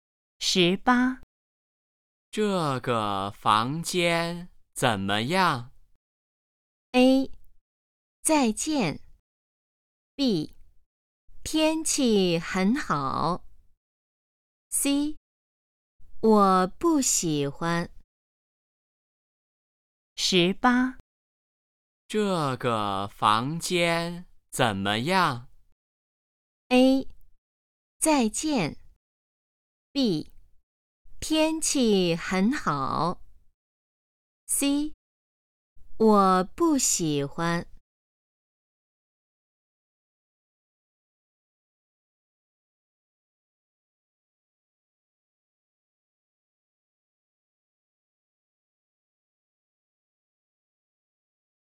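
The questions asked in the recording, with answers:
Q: 这个房间怎么样?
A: C: 我不喜欢。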